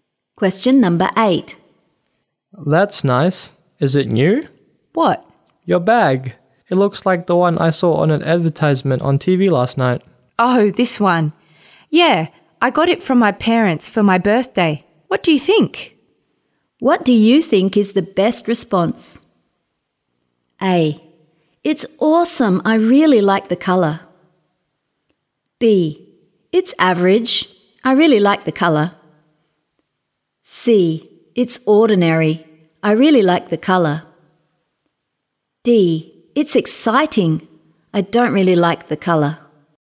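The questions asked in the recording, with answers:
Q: What do you think is the best response?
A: A: It's awesome. I really like the colour.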